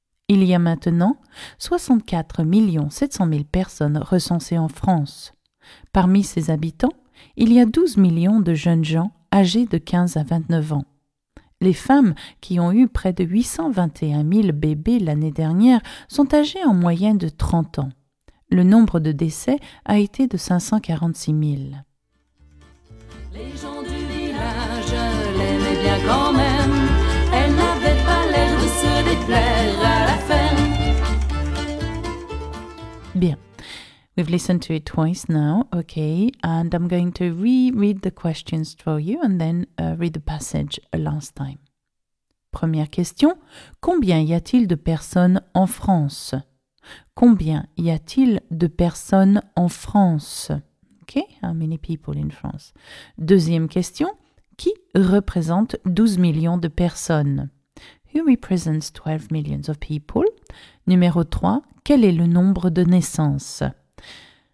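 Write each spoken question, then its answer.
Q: combien y a-t-il de personnes en France?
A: 64 700 000

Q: qui représente 12 millions de personnes?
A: les jeunes gens âgés de 15 à 29 ans

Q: quel est le nombre de naissances?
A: près de 821 000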